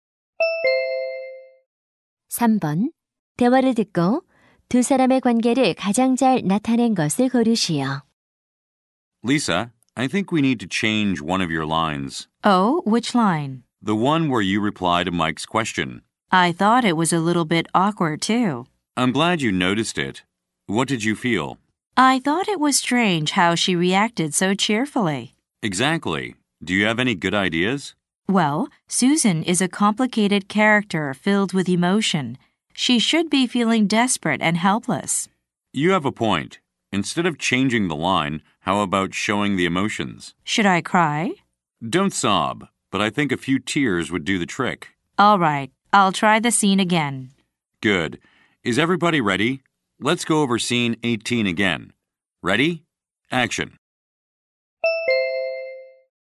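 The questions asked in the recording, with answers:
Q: 대화를 듣고 두 사람의 관계를 가장 잘 나타낸 것을 고르시오.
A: 연출가(감독) - 배우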